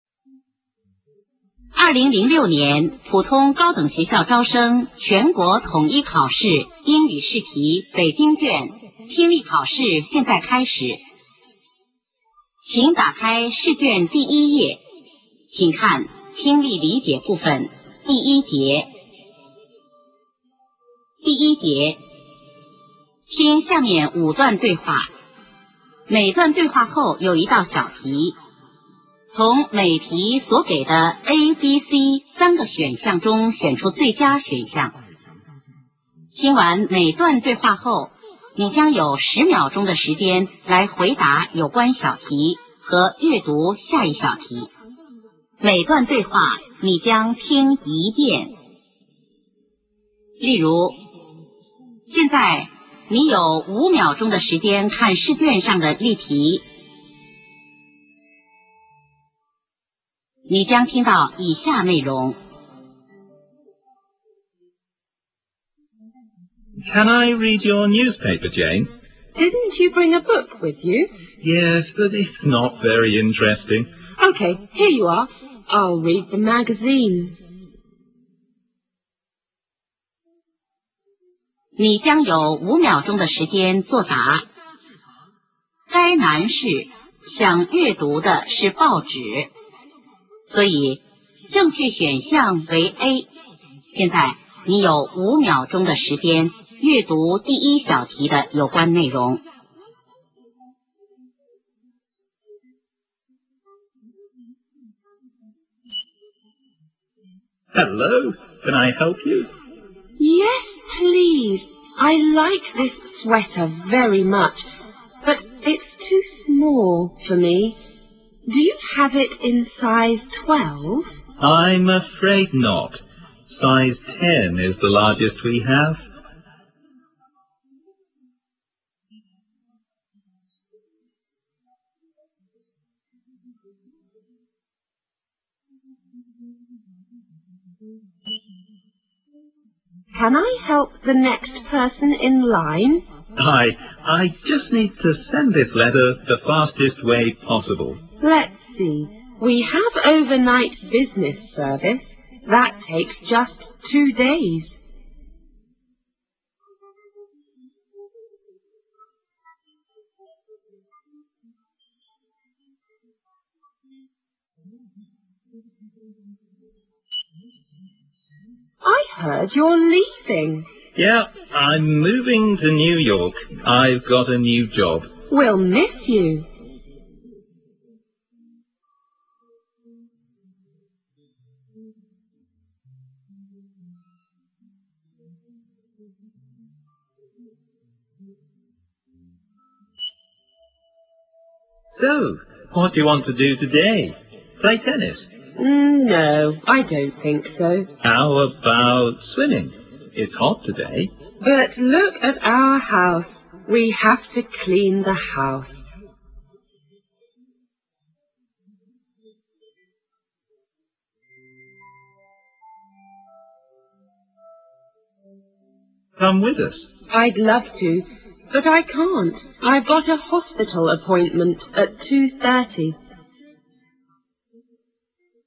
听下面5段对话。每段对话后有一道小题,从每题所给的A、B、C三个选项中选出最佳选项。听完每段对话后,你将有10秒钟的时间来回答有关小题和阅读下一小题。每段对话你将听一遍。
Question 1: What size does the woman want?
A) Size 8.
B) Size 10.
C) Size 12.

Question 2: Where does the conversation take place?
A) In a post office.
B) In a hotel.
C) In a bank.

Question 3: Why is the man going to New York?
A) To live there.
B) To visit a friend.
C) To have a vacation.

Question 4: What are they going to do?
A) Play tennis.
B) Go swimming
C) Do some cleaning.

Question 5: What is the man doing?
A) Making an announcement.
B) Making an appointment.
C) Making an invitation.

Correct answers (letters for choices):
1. C
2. A
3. A
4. C
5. C

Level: 高考